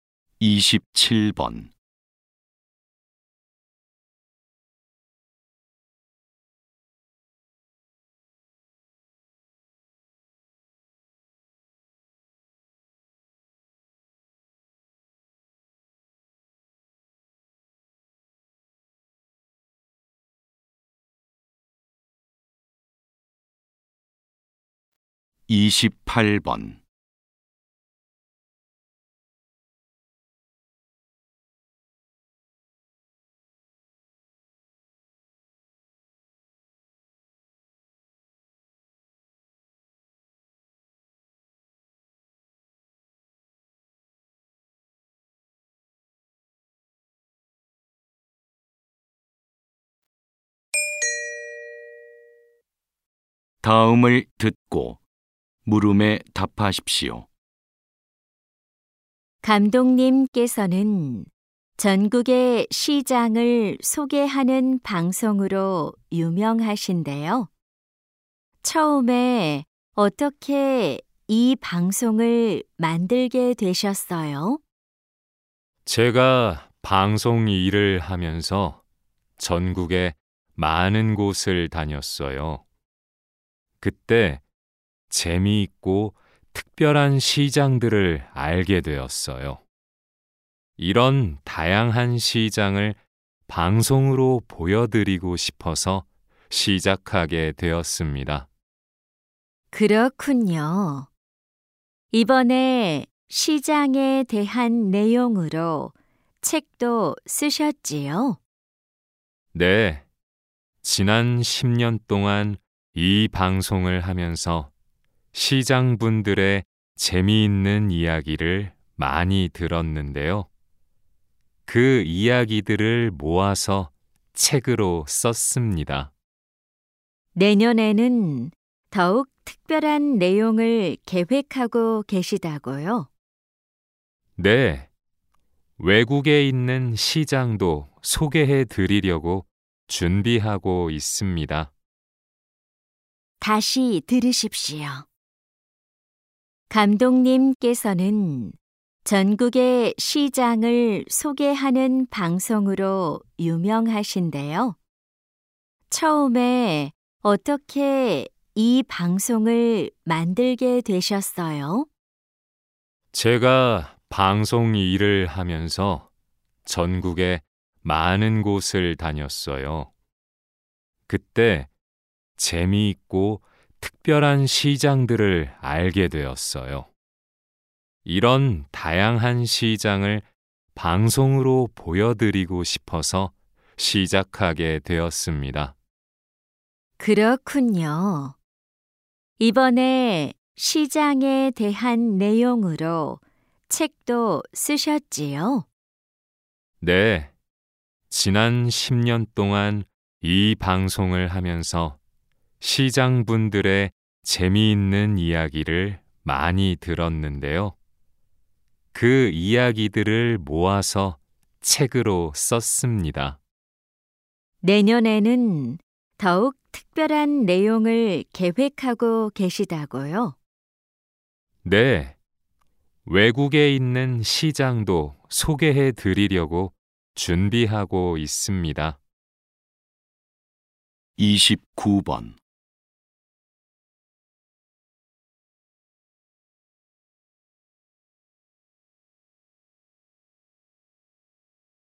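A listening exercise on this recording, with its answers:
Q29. 남자가 이 방송을 만든 이유를 고르십시오. (3점)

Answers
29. 다양한 시장을 방송으로 보여 주고 싶어서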